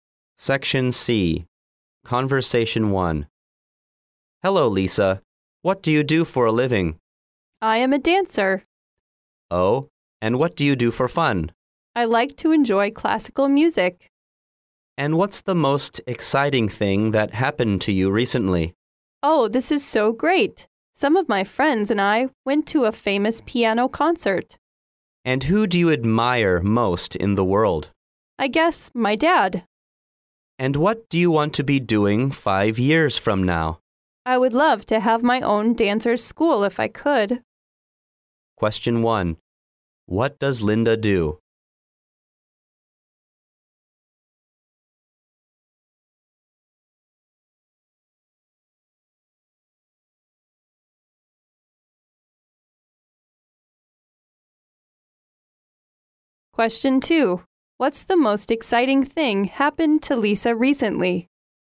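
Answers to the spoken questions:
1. She is a dancer
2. She went to a famous piano concert with friends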